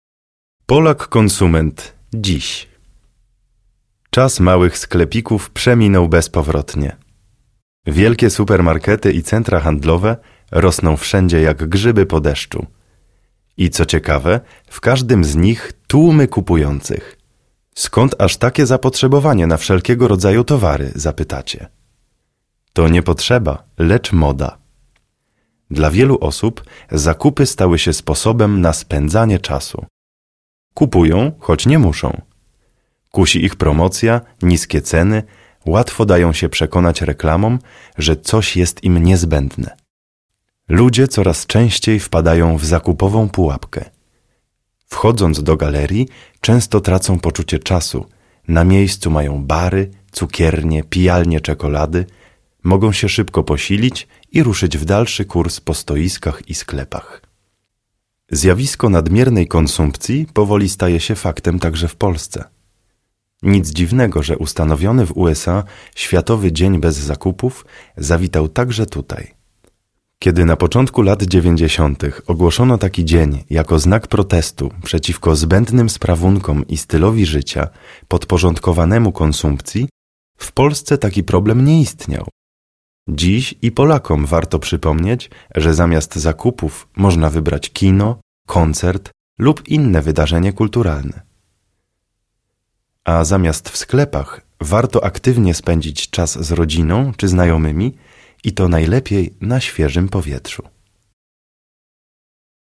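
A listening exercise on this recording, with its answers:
Odpowiedz „tak" lub „nie" na pytania do tekstu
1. Czy małe sklepiki nadal odgrywają ważną rolę w handlu?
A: nie

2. Czy supermarkety i centra handlowe powstają coraz częściej?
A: tak

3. Czy w centrach handlowych zwykle nie ma wielu klientów?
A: nie

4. Czy zakupy są dla wielu osób sposobem na spędzanie wolnego czasu?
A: tak

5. Czy ludzie zawsze kupują tylko wtedy, gdy naprawdę muszą?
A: nie

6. Czy promocje i niskie ceny zachęcają ludzi do zakupów?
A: tak

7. Czy reklamy nie mają wpływu na decyzje zakupowe ludzi?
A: nie

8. Czy autor tekstu uważa, że istnieje coś takiego jak „zakupowa pułapka"?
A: tak

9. Czy w galeriach handlowych można coś zjeść i odpocząć?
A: tak

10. Czy zjawisko nadmiernej konsumpcji dotyczy także Polski?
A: tak

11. Czy Światowy Dzień Bez Zakupów powstał jako protest przeciwko konsumpcjonizmowi?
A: tak

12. 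Czy autor tekstu zachęca do spędzania wolnego czasu inaczej niż na zakupach?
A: tak

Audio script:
Czas małych sklepików przeminął bezpowrotnie. Wielkie supermarkety i centra handlowe rosną wszędzie jak grzyby po deszczu. I co ciekawe, w każdym z nich tłumy kupujących. Skąd aż takie zapotrzebowanie na wszelkiego rodzaju towary? – zapytacie. To nie potrzeba, lecz moda. Dla wielu osób zakupy stały się sposobem na spędzanie czasu. Kupują, choć nie muszą. Kusi ich promocja, niskie ceny, łatwo dają się przekonać reklamom, że coś jest im niezbędne. Ludzie coraz częściej wpadają w „zakupową pułapkę". Wchodząc do galerii często tracą poczucie czasu, na miejscu mają bary, cukiernie, pijalnie czekolady – mogą się szybko posilić i ruszyć w dalszy kurs po stoiskach i sklepach.
Zjawisko nadmiernej konsumpcji powoli staje się faktem także w Polsce. Nic dziwnego, że ustanowiony w USA Światowy Dzień Bez Zakupów zawitał także tutaj. 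Kiedy na początku lat 90-tych ogłoszono taki dzień jako znak protestu przeciwko zbędnym sprawunkom i stylowi życia podporządkowanemu konsumpcji, w Polsce taki problem nie istniał. Dziś i Polakom warto przypomnieć, że zamiast zakupów można wybrać kino, koncert lub inne wydarzenie kulturalne. A zamiast w sklepach warto aktywnie spędzić czas z rodziną czy znajomymi i to najlepiej na świeżym powietrzu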